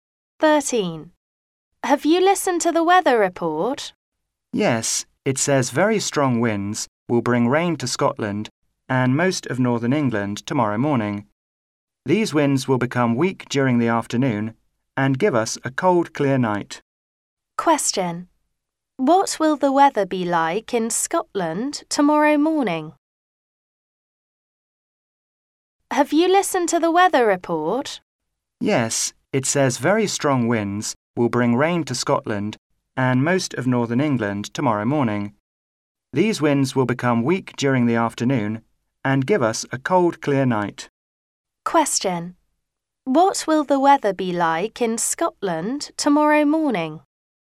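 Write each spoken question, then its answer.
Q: What will the weather be like in Scotland tomorrow morning?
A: Very windy and rainy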